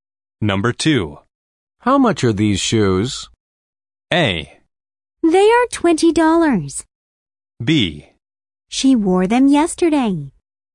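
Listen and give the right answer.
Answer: A: They are $20.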